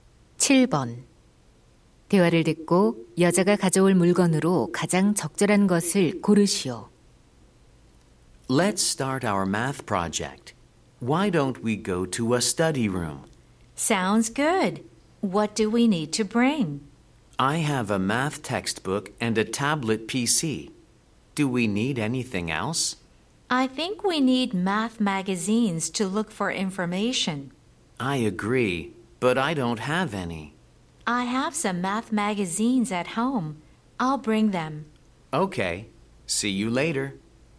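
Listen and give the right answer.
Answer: 수학 잡지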